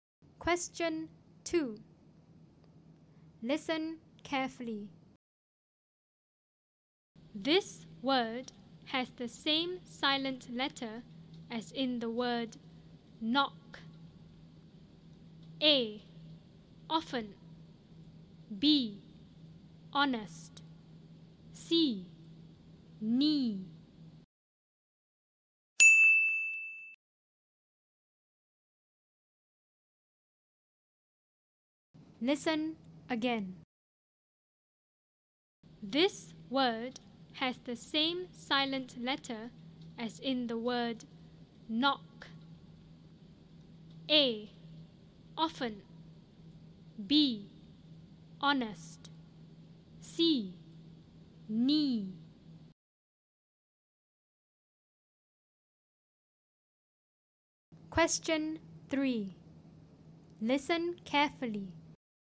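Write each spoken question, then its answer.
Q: This word has the same silent letter as in the word knock.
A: C: Knee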